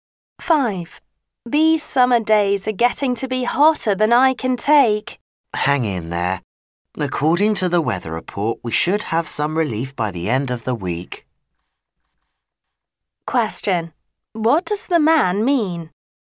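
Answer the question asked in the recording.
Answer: The hot weather will end soon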